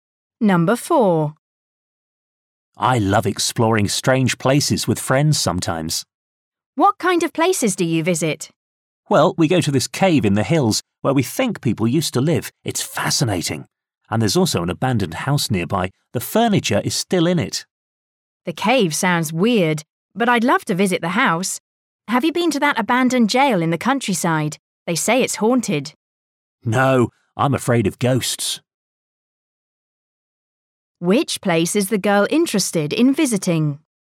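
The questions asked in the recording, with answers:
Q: Which place is the girl interested in visiting?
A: The abandoned house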